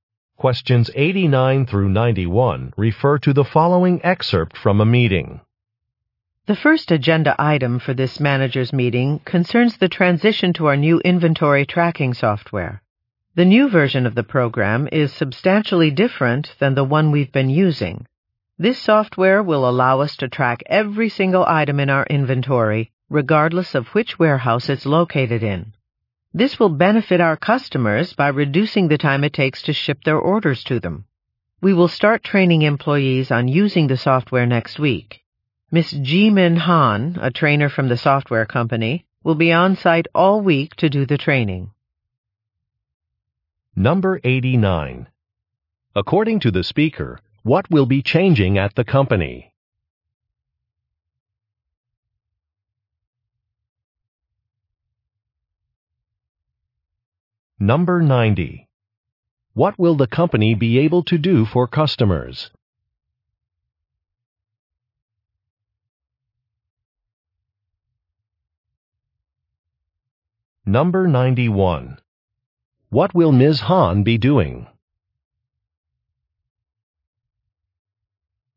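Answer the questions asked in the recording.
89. Its inventory tracking software
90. Ship orders faster
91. Training employees on the software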